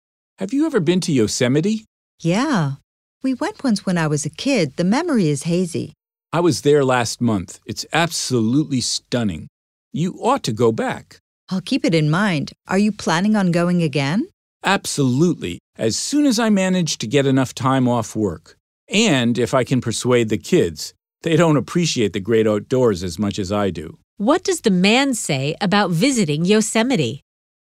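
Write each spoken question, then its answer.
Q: What does the man say about visiting Yosemite?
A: He wants to go again when he can get time off and persuade his kids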